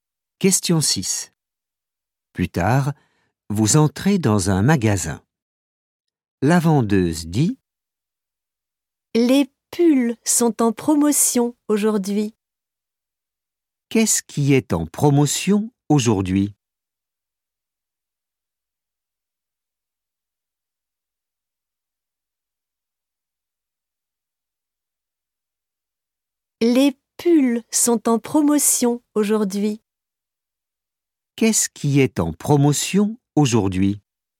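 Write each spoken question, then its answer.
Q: Qu'est-ce qui est en promotion aujourd'hui?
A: Les pulls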